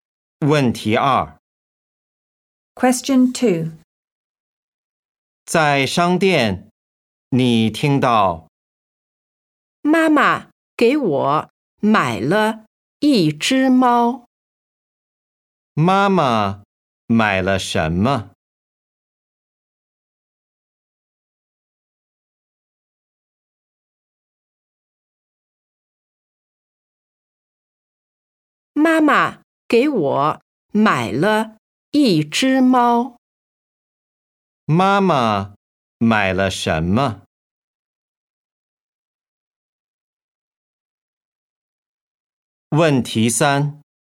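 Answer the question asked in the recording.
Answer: 一只猫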